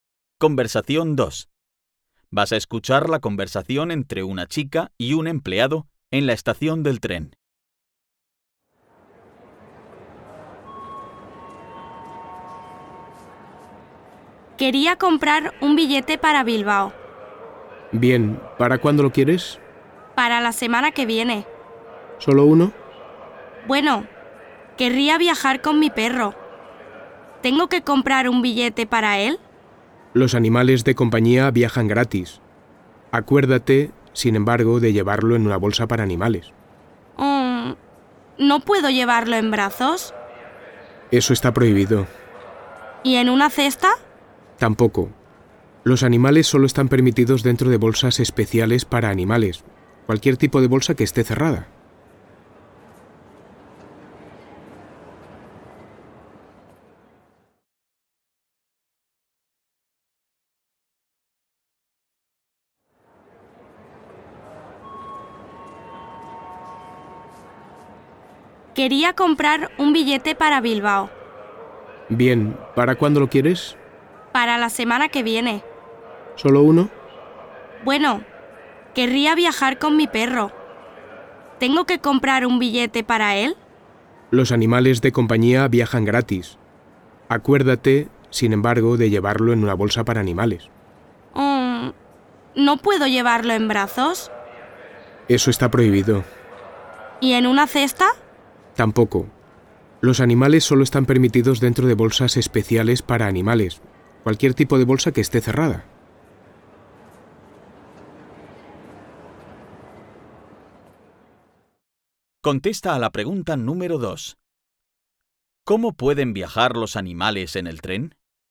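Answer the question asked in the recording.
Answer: En una bolsa cerrada para animales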